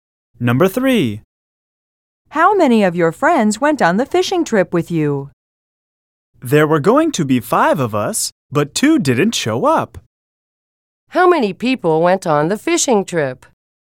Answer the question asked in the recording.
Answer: then only 3 people went on the trip.